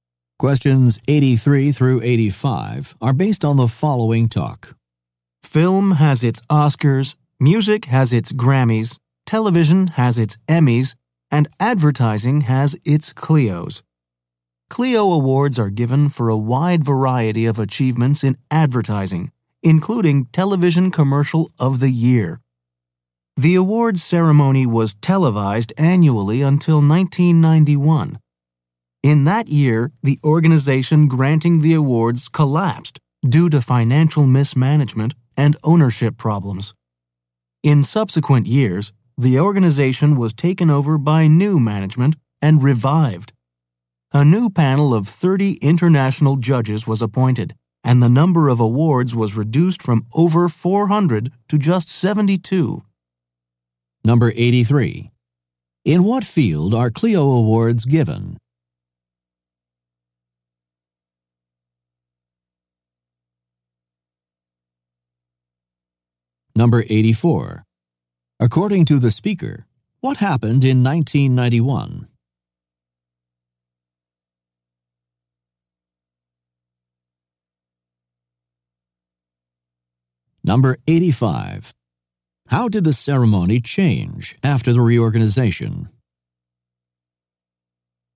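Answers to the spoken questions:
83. Advertising
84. The organization collapsed
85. Fewer awards (72) and a new panel of 30 international judges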